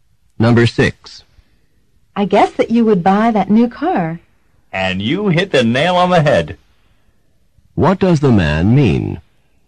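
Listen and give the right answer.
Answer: The woman guessed correctly.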